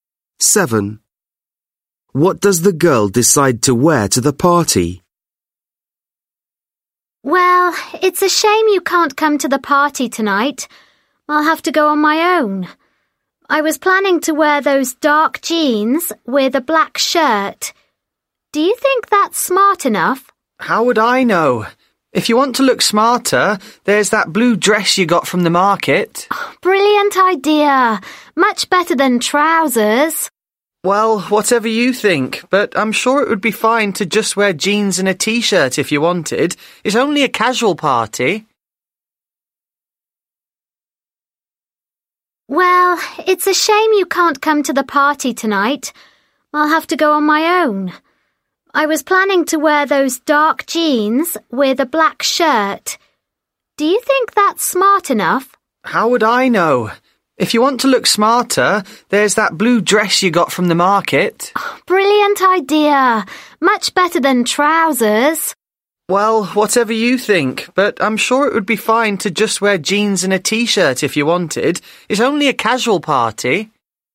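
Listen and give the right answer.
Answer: The blue dress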